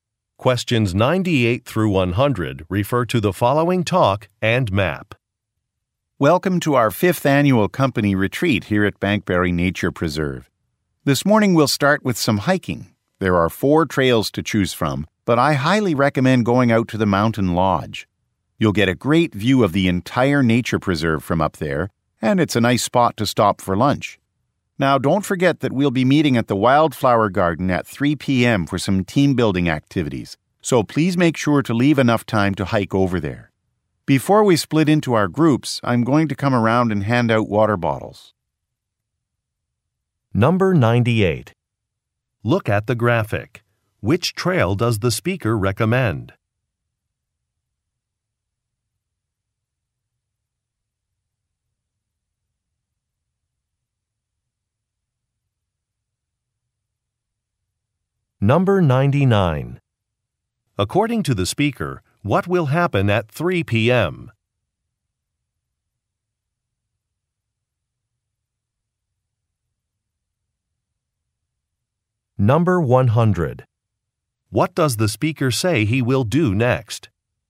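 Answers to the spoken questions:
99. Team-building activities at the Wildflower Garden
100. Hand out water bottles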